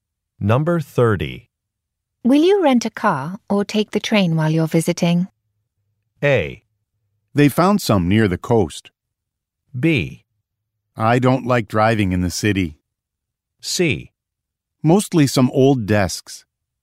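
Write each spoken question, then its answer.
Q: Will you rent a car or take the train while you're visiting?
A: B: I don't like driving in the city.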